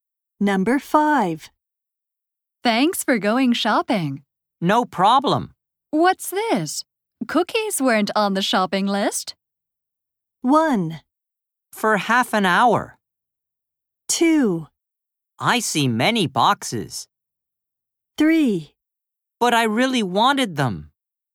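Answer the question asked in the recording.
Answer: 3: But I really wanted them.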